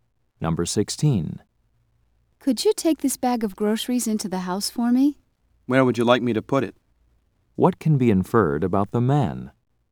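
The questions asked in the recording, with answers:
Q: What can be inferred about the man?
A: He will carry the groceries in.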